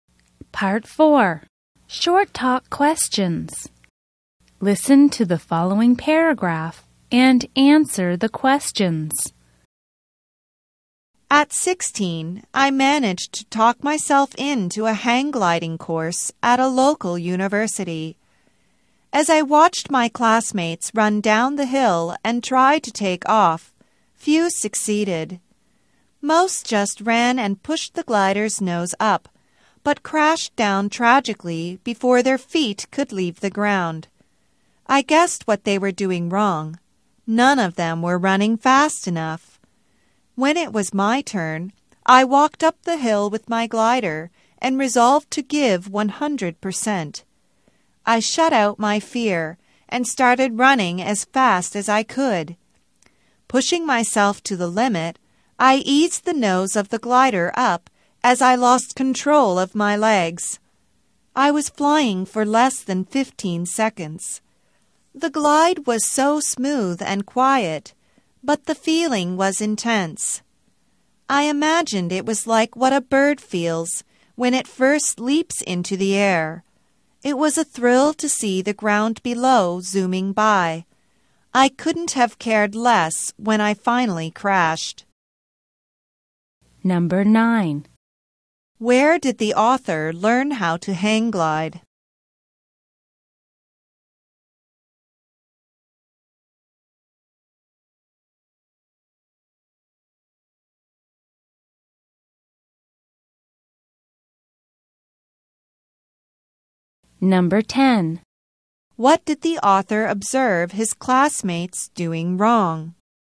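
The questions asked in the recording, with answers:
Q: Where did the author learn how to hang glide?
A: At a local university.

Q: What did the author observe his classmates doing wrong?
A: They weren't running fast enough.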